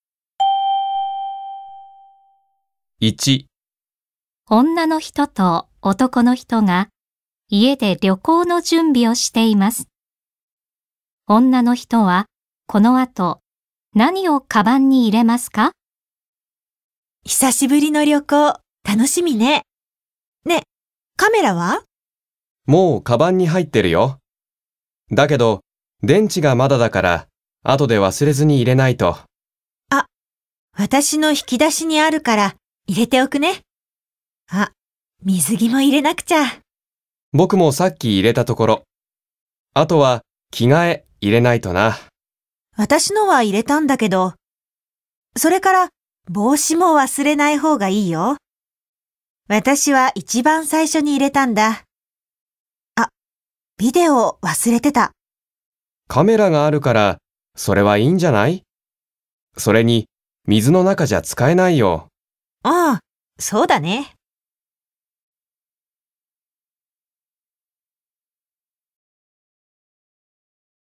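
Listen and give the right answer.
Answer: 電池と水着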